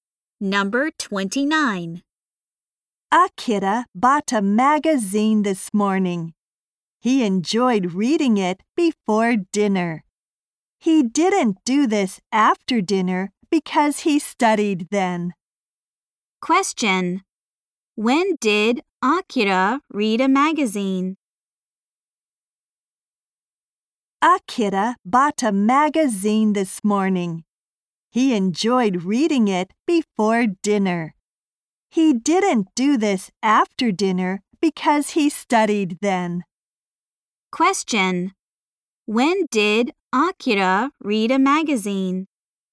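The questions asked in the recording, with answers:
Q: When did Akira read a magazine?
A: Before dinner.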